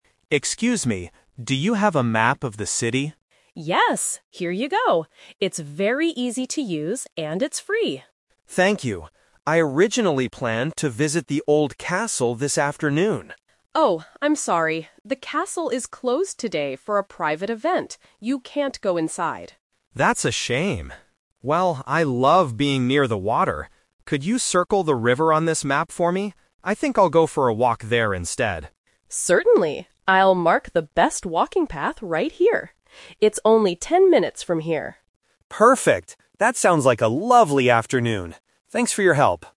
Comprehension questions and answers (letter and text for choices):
Listen to the conversation at a tourist information center and choose the correct answer (A, B, or C).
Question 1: What does the man receive from the staff member?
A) A ticket for the castle.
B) A map of the city.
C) A book about the river.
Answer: B) A map of the city.

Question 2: Why can't the man visit the castle today?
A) Because it is too far away.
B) Because he doesn't have a map.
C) Because it is closed for an event.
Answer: C) Because it is closed for an event.

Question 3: What will the man do this afternoon?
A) He will visit the old castle.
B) He will stay at the information center.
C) He will walk along the river.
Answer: C) He will walk along the river.

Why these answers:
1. Why B is correct: At the beginning, the man asks, "do you have a map...?" and the staff responds, "Yes, here you go." Why A is a trap: The castle is mentioned, but he doesn't get a ticket because it's closed. Why C is wrong: A book is never mentioned in the dialogue.
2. Why C is correct: The staff member explicitly says, "The castle is closed today for a private event." Why A is wrong: Distance is not mentioned as the reason for the closure. Why B is a trap: He does have a map now, so that's not the reason he can't go.
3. Why C is correct: This is the A2 "Twist." After finding out the castle is closed, he says, "I think I'll go for a walk there [the river] instead." Why A is a trap: This was his original plan, but it changed because the castle was closed. Why B is wrong: There is no information suggesting he will stay at the center.

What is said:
Tourist (Man): Excuse me, do you have a map of the city?
Staff (Woman): Yes, here you go. It's very easy to use and it's free.
Tourist: Thank you. I originally planned to visit the old castle this afternoon.
Staff: Oh, I'm sorry. The castle is closed today for a private event. You can't go inside.
Tourist: That's a shame. Well, I love being near the water. Could you circle the river on this map for me? I think I'll go for a walk there instead.
Staff: Certainly! I'll mark the best walking path right here.